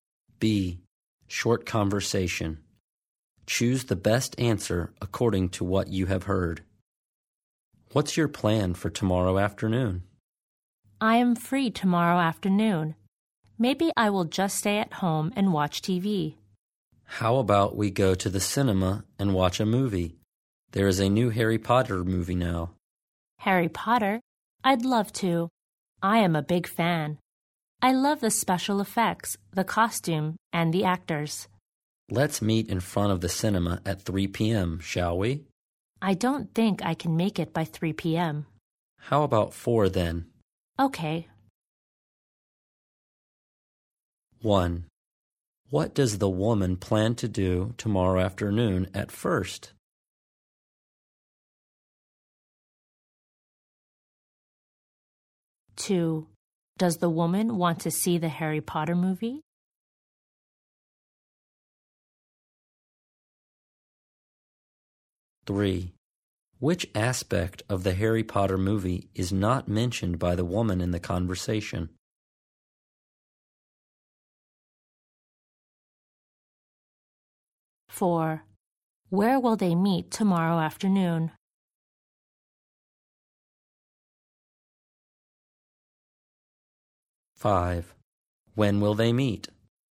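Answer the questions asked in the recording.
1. Stay at home and watch TV
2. Yes, she's a big fan
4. In front of the cinema
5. At 4 p.m.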